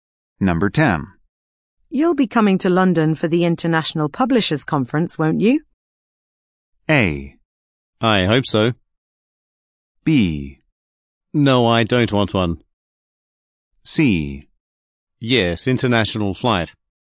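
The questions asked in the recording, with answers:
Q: You'll be coming to London for the International Publishers Conference, won't you?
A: A: I hope so.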